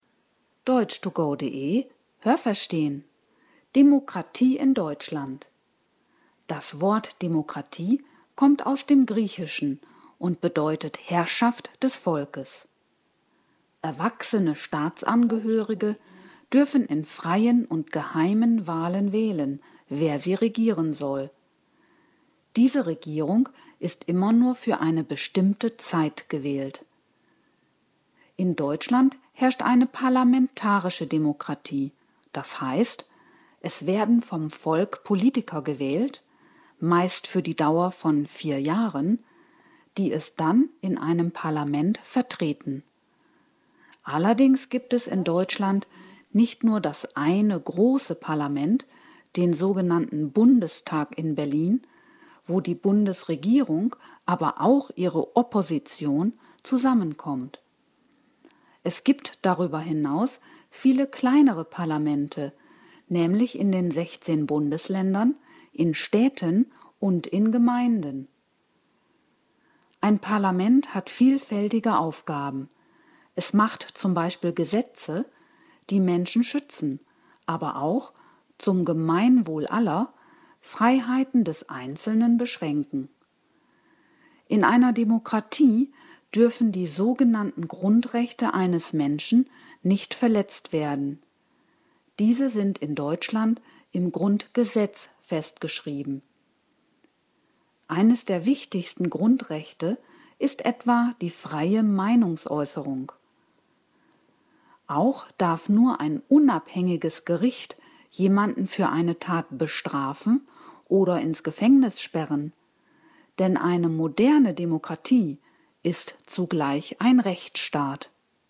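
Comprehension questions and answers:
Welches Nomen passt?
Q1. In Deutschland dürfen die Bürger, d.h. erwachsene _____ , in freien und geheimen Wahlen wählen.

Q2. Die _____ einer Demokratie ist immer nur für eine bestimmte Zeit gewählt.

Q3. Es gibt in Deutschland nicht nur den _____ in Berlin als einziges Parlament.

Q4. Auch die _____ ist Teil des Parlaments.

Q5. Die Grundrechte sind im _____ festgeschrieben.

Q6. Eines der wichtigsten Grundrechte ist die freie _____ .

Haben Sie das gehört? Stimmt diese Aussage?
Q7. Das Wort Demokratie ist aus dem Lateinischen und bedeutet „Wir sind das Volk".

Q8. Wahlen in einer Demokratie sind frei und geheim.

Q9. In Deutschland vertreten Politiker das Volk für eine bestimmte Zeit in einem Parlament.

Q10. Die Opposition der Regierung sitzt nicht im Parlament.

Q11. Deutschland wird nur von einem großen Parlament, nämlich dem Bundestag in Berlin, regiert.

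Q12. In einer Demokratie dürfen die Grundrechte des Menschen nicht missachtet werden.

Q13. In Deutschland entscheidet die Regierung, ob ein Mensch z.B. für eine Tat bestraft wird und ins Gefängnis kommt.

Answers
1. Staatsangehörige
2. Regierung
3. Bundestag
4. Opposition
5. Grundgesetz
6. Meinungsäußerung
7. falsch
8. richtig
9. richtig
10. falsch
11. falsch
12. richtig
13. falsch

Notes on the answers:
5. Grundgesetz = Verfassung der Bundesrepublik Deutschland
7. Es kommt aus dem Griechischen und bedeutet „Herrschaft des Volkes".
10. Sie sitzt ebenfalls im Parlament.
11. Es gibt viele kleinere Parlamente in den Bundesländern, Städten und Gemeinden.
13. Dies dürfen nur unabhängige Gerichte, denn Deutschland ist ein Rechtsstaat.

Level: Hörtexte C (schwer)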